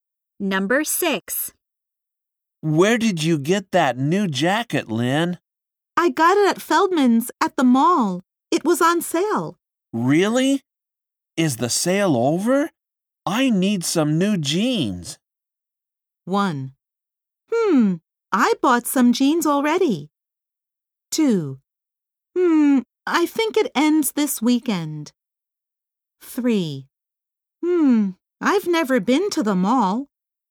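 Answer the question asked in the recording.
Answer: 2: I think it ends this weekend.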